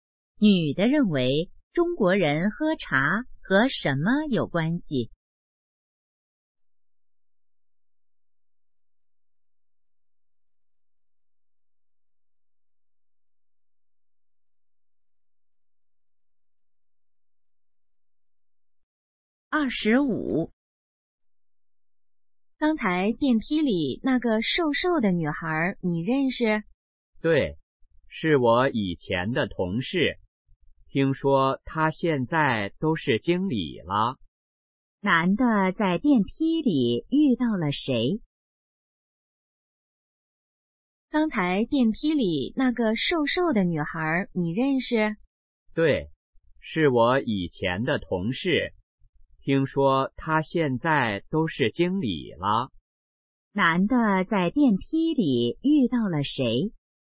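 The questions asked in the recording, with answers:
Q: 男的在电梯里遇到了谁?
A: 以前的同事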